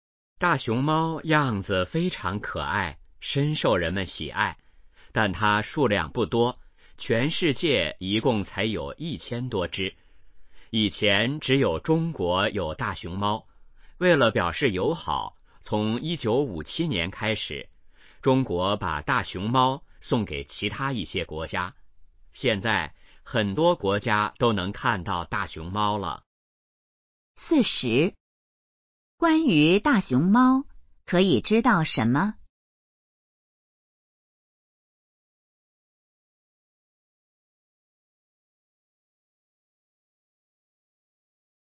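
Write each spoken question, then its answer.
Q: 中国为什么要送大熊猫出国?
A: 为了表示友好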